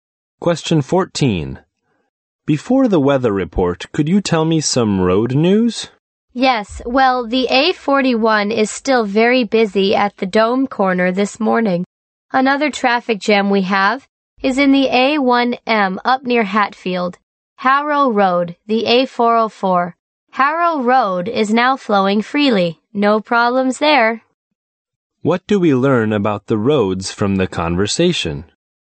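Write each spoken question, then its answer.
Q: What do we learn about the roads from the conversation?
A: The A41 and A1M are congested, but Harrow Road is flowing freely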